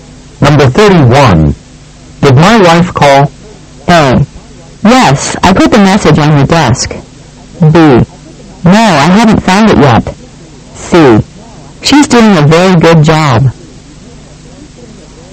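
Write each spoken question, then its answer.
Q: Did my wife call?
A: A: Yes, I put the message on your desk.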